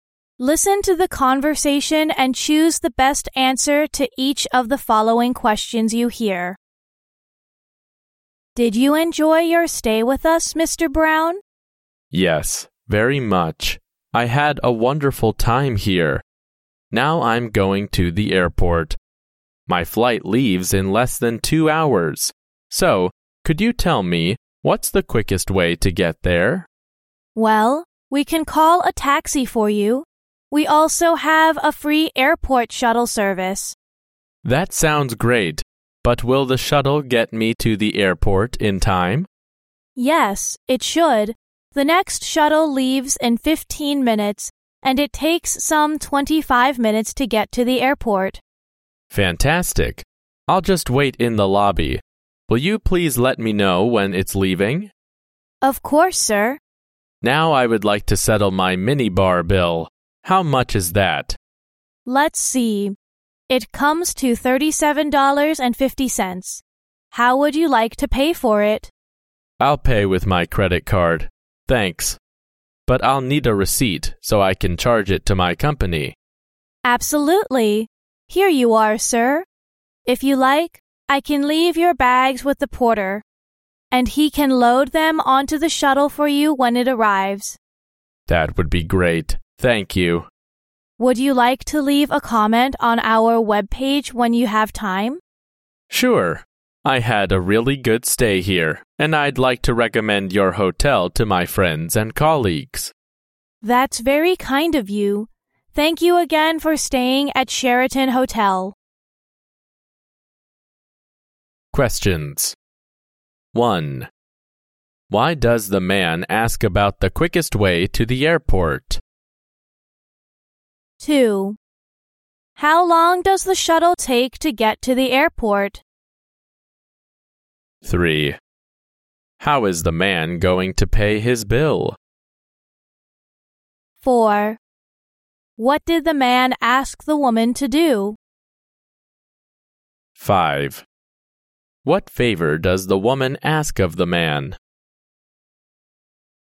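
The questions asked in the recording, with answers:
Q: Why does the man ask about the quickest way to the airport?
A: His flight leaves in less than 2 hours.

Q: How long does the shuttle take to get to the airport?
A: About 25 minutes.

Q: How is the man going to pay his bill?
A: With his credit card.

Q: What favor does the woman ask of the man?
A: To leave a comment on the hotel's webpage.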